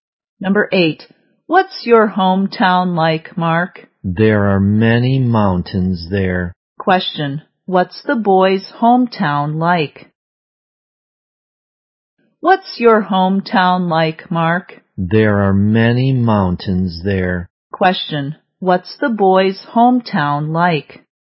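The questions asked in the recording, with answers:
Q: what's the boy's hometown like?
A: There are many mountains there.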